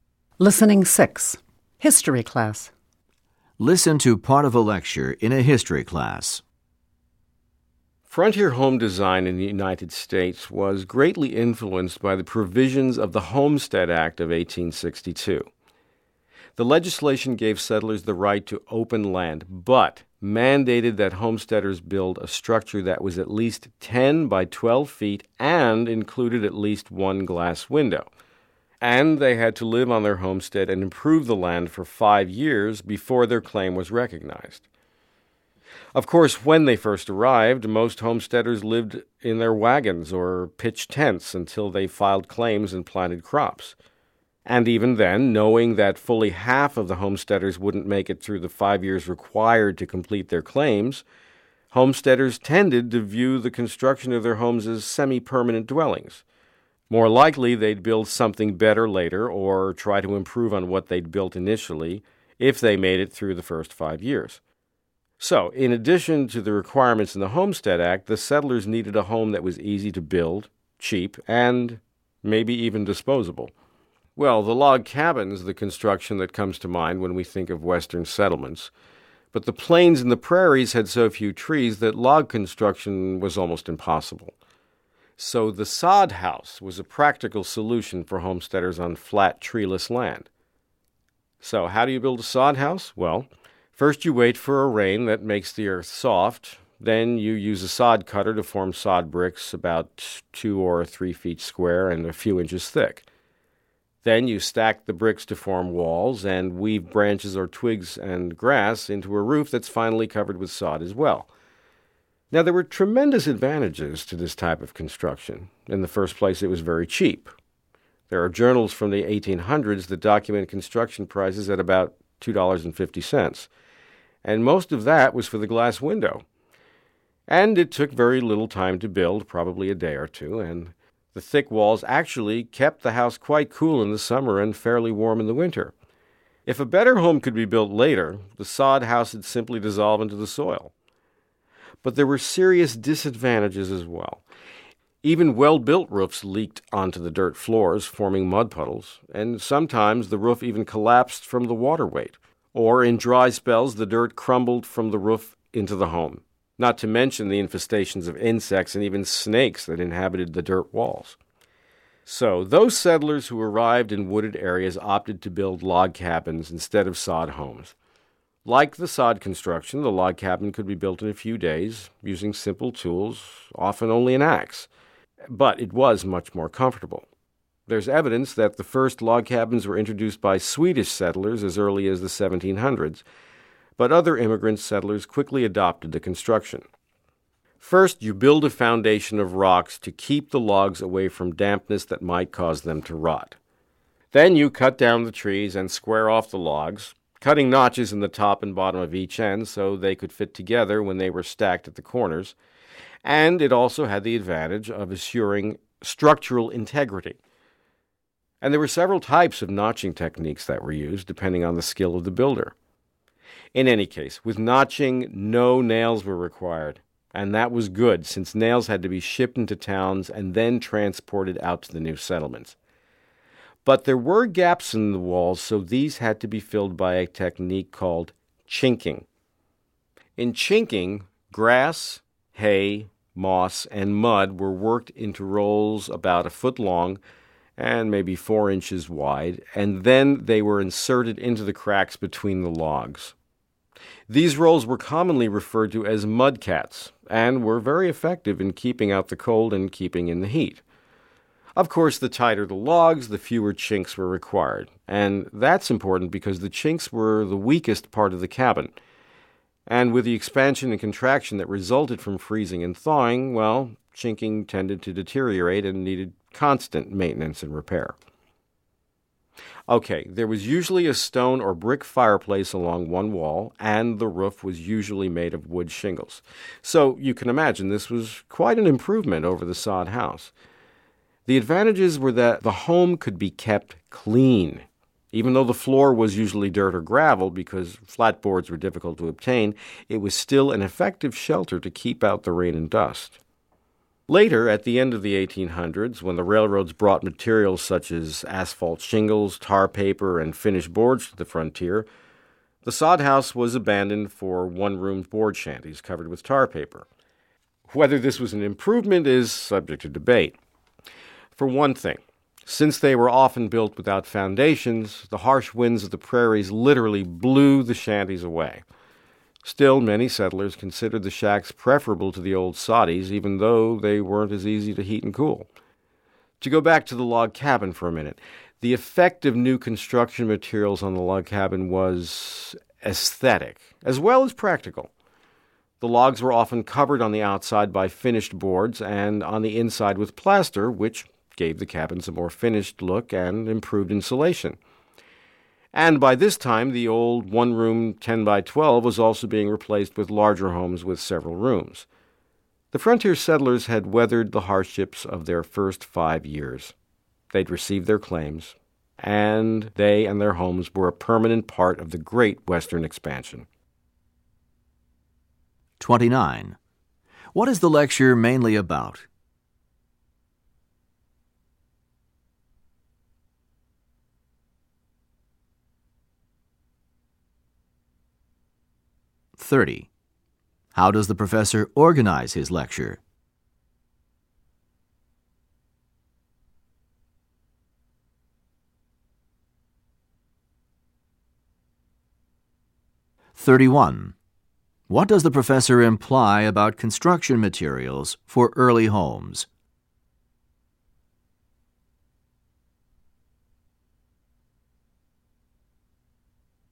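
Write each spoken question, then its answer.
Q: What is the lecture mainly about?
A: Frontier home designs: sod houses and log cabins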